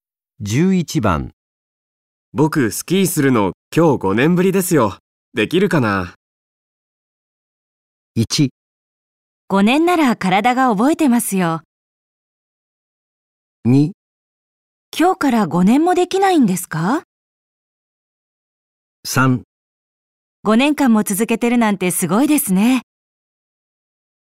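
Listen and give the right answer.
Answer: 1: 5年なら体が覚えてますよ。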